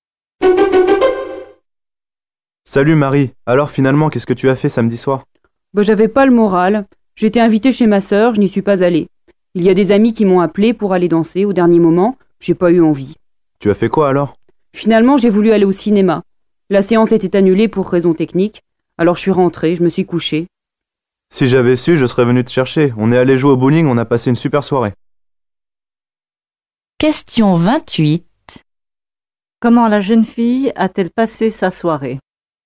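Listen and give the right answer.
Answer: Elle est rentrée se coucher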